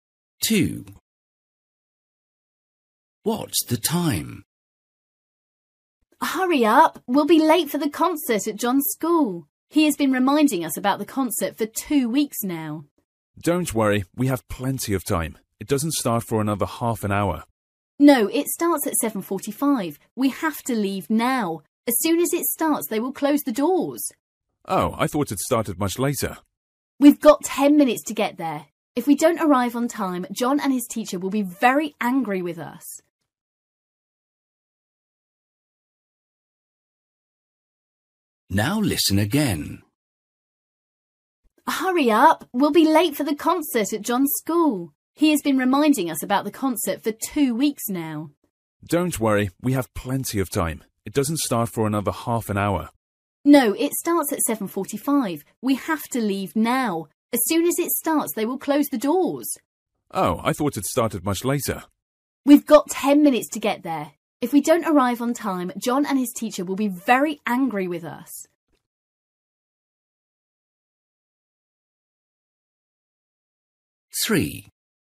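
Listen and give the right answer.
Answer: 7:35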